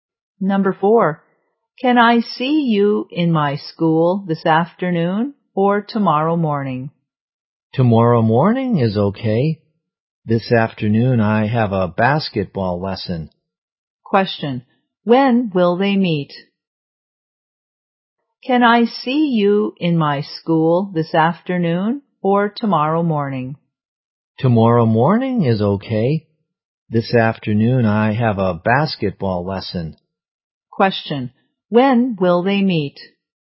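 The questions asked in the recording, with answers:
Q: Question, when will they meet?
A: Tomorrow morning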